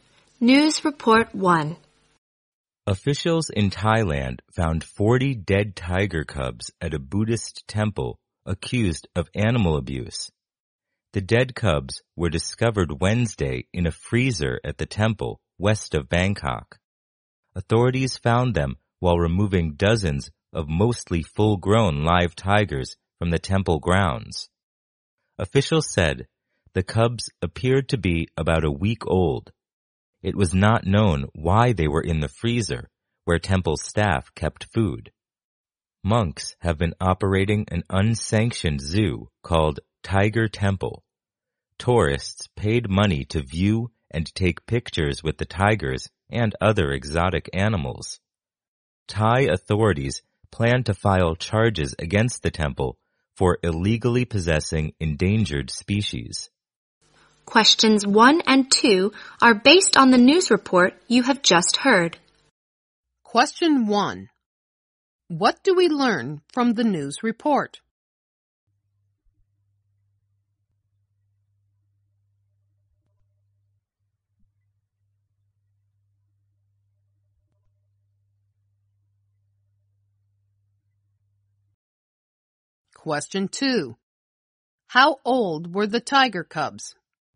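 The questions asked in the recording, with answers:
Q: How old were the tiger cubs?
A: About a week old.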